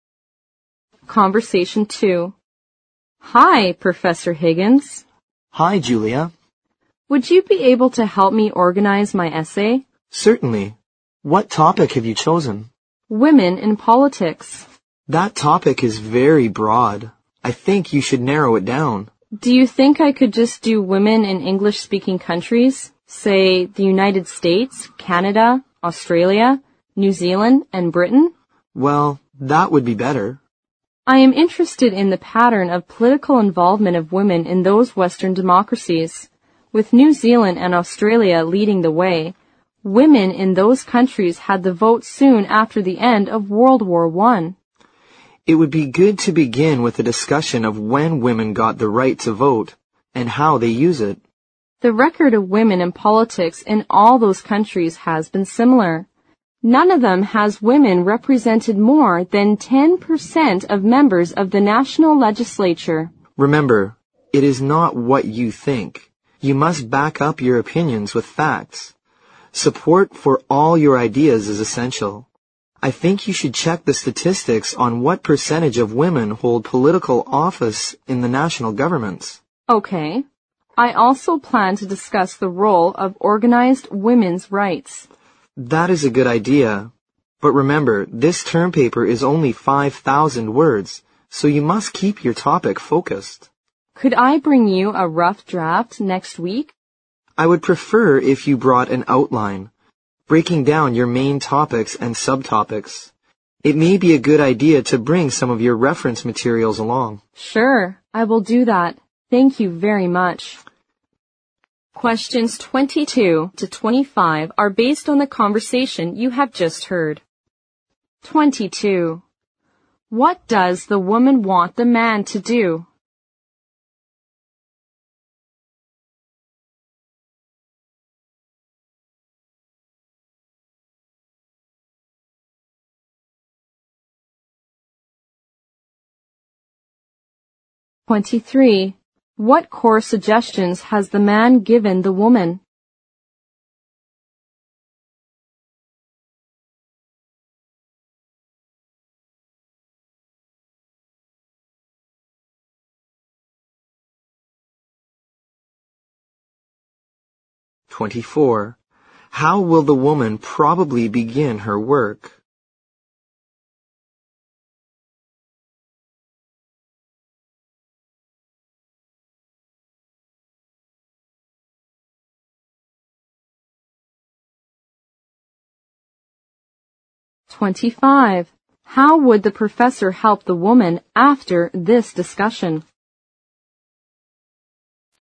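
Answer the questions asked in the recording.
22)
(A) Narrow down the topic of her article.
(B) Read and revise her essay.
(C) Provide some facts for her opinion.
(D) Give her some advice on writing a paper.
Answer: (D) Give her some advice on writing a paper.
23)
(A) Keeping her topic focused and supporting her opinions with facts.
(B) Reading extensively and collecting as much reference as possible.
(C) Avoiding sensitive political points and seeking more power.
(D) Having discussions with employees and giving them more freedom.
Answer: (A) Keeping her topic focused and supporting her opinions with facts.
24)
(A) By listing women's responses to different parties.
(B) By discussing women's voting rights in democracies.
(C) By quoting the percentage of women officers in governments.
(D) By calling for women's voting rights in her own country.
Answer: (B) By discussing women's voting rights in democracies.
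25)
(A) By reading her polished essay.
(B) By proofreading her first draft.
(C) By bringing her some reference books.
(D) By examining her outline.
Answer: (D) By examining her outline.

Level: 六级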